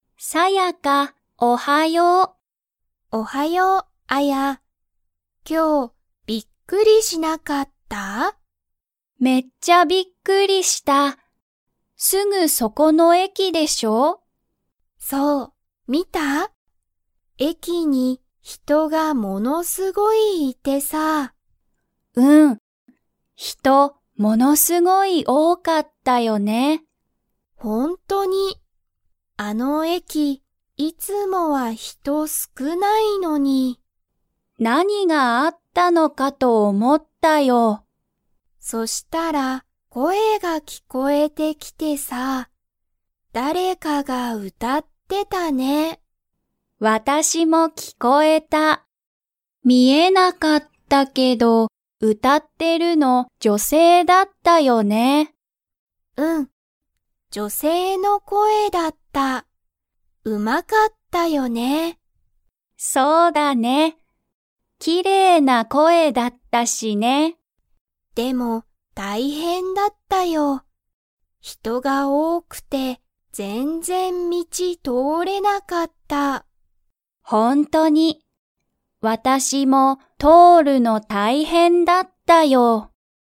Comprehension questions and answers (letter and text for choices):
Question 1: すぐそこの駅えきには、いつもは人ひとが 。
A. 多おおい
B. 少すくない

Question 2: 歌うたってるのは誰だれでしたか?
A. アヤの友達ともだち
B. サヤカの母はは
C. 男性だんせい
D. 女性じょせい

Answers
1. B. 少すくない
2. D. 女性じょせい

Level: Level 3